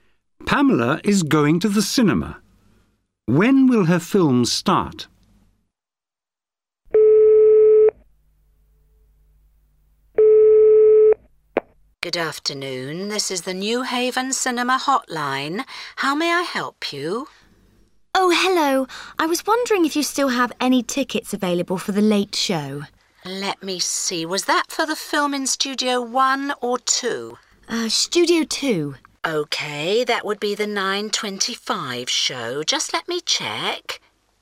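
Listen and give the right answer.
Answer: 9:25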